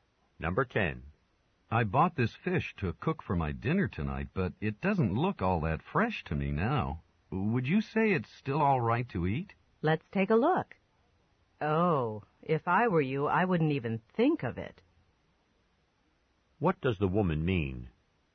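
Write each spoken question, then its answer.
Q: What does the woman mean?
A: He shouldn't eat the fish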